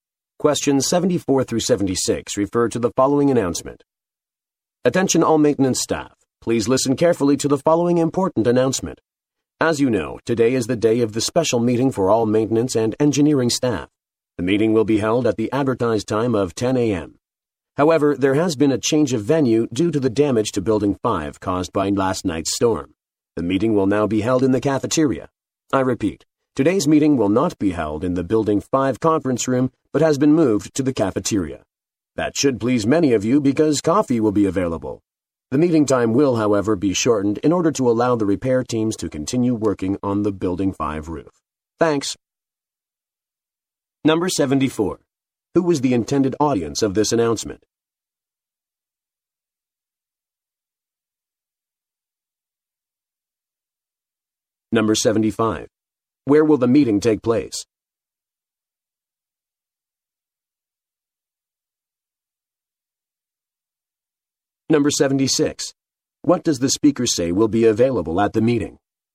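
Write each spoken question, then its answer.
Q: Who was the intended audience of this announcement?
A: Maintenance and engineering staff

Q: Where will the meeting take place?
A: In the cafeteria

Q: What does the speaker say will be available at the meeting?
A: Coffee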